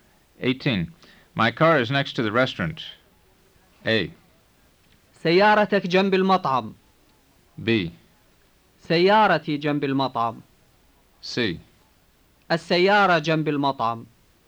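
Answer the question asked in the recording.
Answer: B: سيارتي جنب المطعم.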